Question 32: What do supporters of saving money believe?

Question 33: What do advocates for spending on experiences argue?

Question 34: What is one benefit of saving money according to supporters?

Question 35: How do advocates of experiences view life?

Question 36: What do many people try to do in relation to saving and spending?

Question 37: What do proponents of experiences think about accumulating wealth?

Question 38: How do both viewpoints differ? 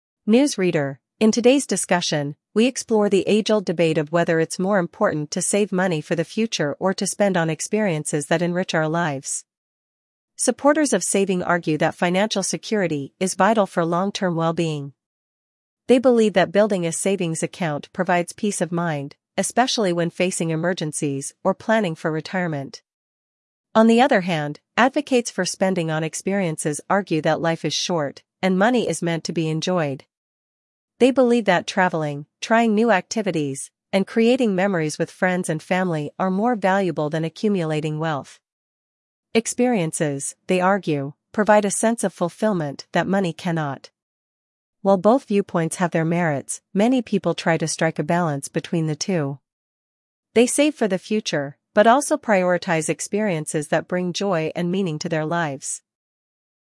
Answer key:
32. Financial security is vital for long-term well-being.
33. Life is short, and money is meant to be enjoyed.
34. Peace of mind during emergencies or retirement planning.
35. Life is short, so they prioritize experiences.
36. Save for the future and prioritize meaningful experiences.
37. They believe wealth does not bring fulfillment.
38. Saving is about security, while experiences are about fulfillment.

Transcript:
News Reader: In today's discussion, we explore the age-old debate of whether it's more important to save money for the future or to spend on experiences that enrich our lives. Supporters of saving argue that financial security is vital for long-term well-being. They believe that building a savings account provides peace of mind, especially when facing emergencies or planning for retirement.
On the other hand, advocates for spending on experiences argue that life is short, and money is meant to be enjoyed. They believe that traveling, trying new activities, and creating memories with friends and family are more valuable than accumulating wealth. Experiences, they argue, provide a sense of fulfillment that money cannot.
While both viewpoints have their merits, many people try to strike a balance between the two. They save for the future, but also prioritize experiences that bring joy and meaning to their lives.